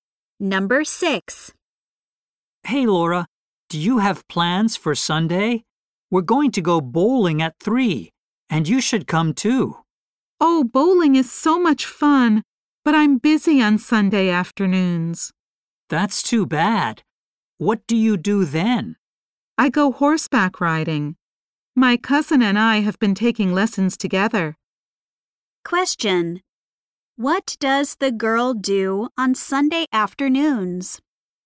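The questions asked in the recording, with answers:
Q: What does the girl do on Sunday afternoons?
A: She goes horseback riding.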